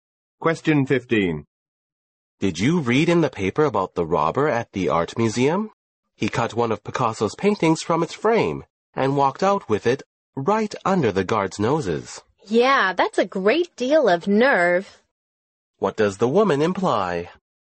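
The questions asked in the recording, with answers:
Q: What does the woman imply?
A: The robber was very bold.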